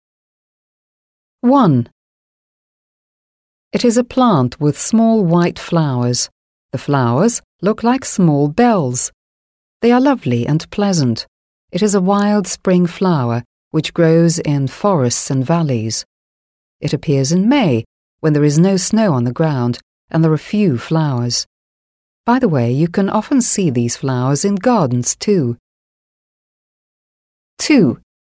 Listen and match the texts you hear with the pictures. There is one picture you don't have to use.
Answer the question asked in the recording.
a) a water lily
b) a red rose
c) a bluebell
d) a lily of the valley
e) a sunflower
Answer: d) a lily of the valley

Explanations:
В этом тексте ключевой подсказкой является фраза «look like small bells» (похожи на маленькие колокольчики) и упоминание, что он растет в «valleys» (долинах). Это прямо указывает на название цветка — lily of the valley.

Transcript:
English: It is a plant with small white flowers. The flowers look like small bells. They are lovely and pleasant. It is a wild spring flower which grows in forests and valleys. It appears in May when there is no snow on the ground and there are few flowers. By the way, you can often see these flowers in gardens too.

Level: 7 класс